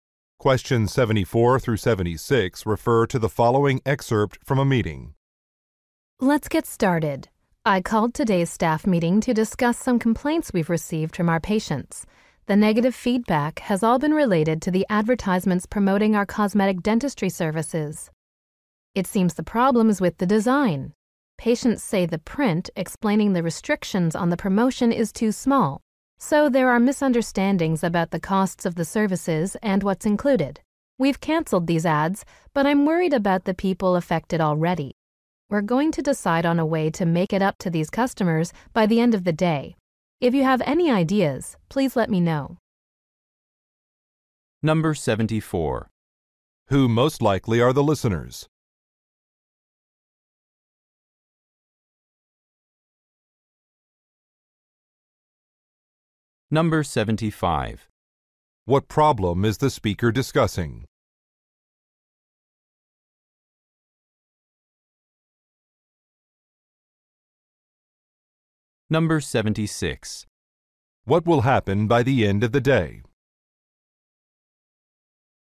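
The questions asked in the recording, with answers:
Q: Who most likely are the listeners?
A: Dental office staff

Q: What problem is the speaker discussing?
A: Ads with print too small, causing misunderstandings about costs

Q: What will happen by the end of the day?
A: A way to compensate affected customers will be decided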